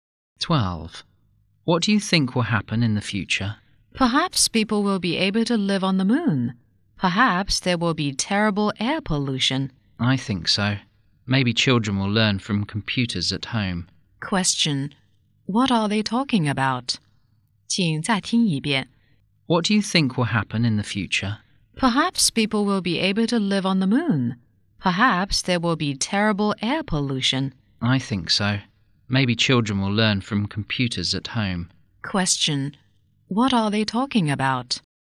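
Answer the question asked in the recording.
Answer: Life in the future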